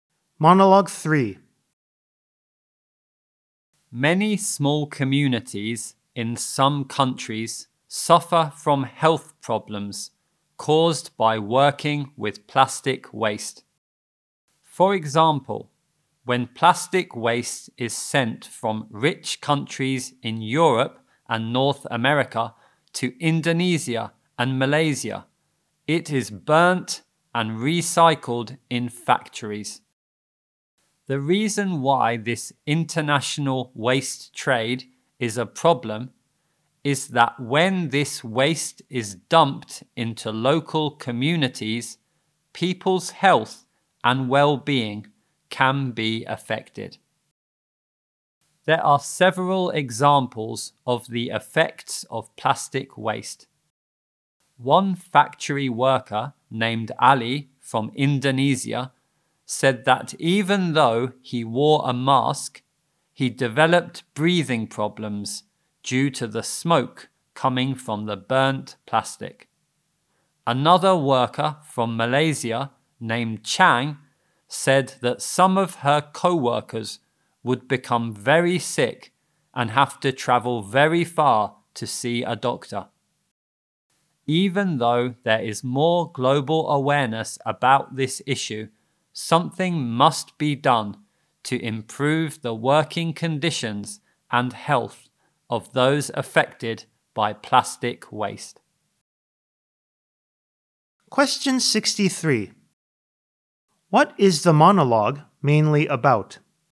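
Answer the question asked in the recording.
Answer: Health problems caused by working with plastic waste from the international waste trade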